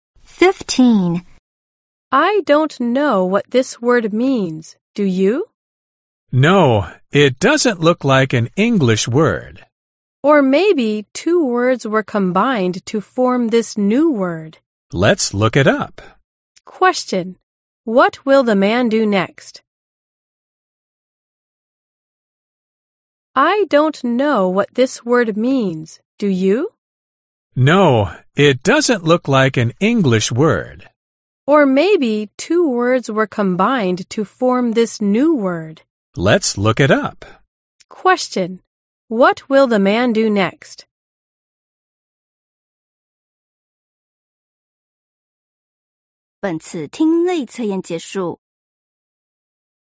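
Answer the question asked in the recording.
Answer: Look up the word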